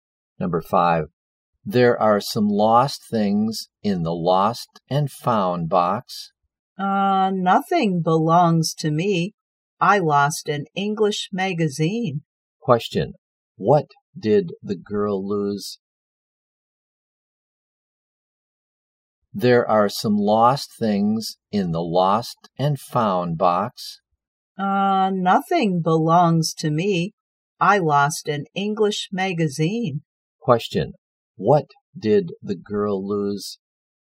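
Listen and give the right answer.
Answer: An English magazine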